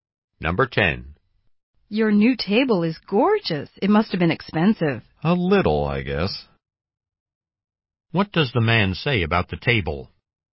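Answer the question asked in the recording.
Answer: It was somewhat expensive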